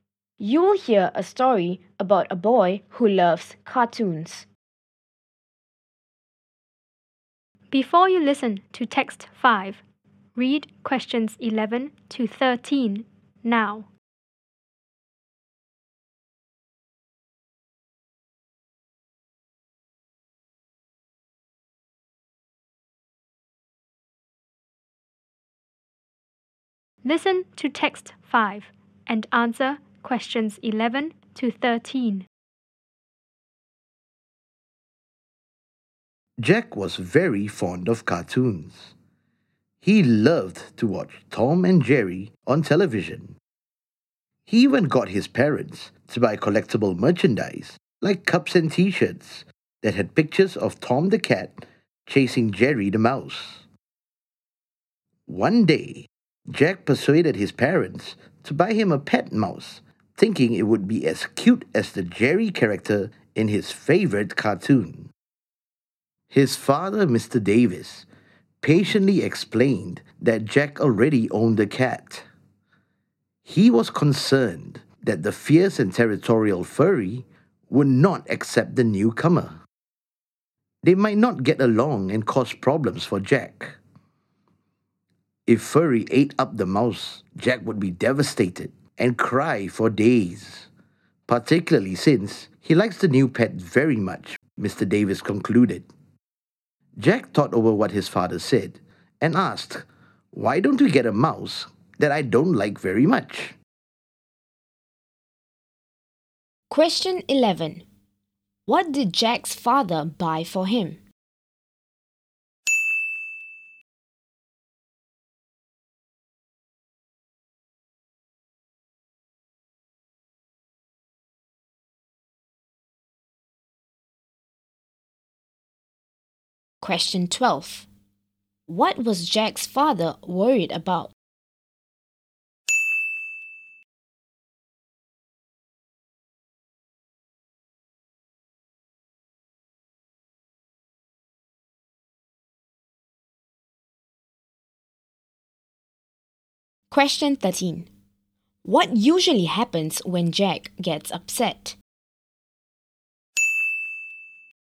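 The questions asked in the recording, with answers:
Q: What was Jack's father worried about?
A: That the cat Furry would not accept the new mouse and might eat it

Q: What usually happens when Jack gets upset?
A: He cries for days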